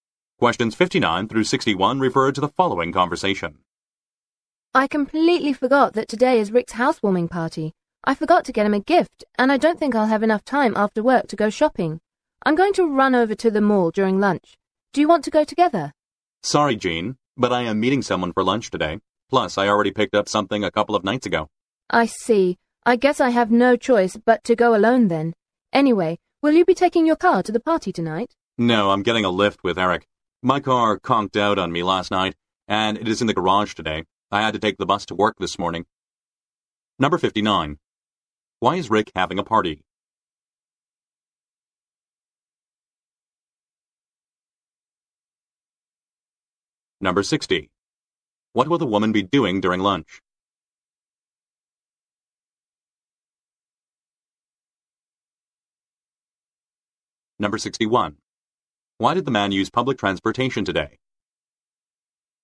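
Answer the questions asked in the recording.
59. It's a housewarming party
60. Going to the mall to buy a gift
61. His car broke down and is in the garage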